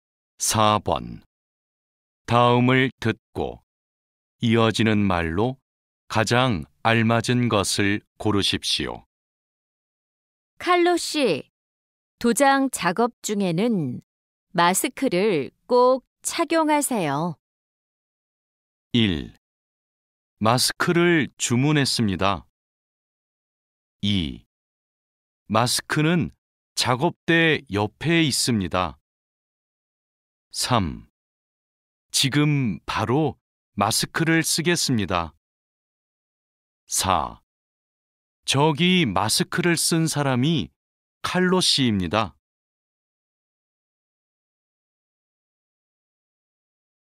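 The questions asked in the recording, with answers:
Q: 칼로 씨, 도장 작업 중에는 마스크를 꼭 착용하세요.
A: 3: 지금 바로 마스크를 쓰겠습니다.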